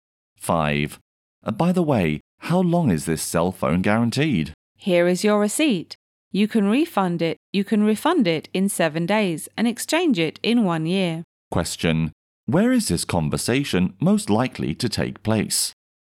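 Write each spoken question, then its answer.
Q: Question, where is this conversation most likely to take place?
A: In a cell phone shop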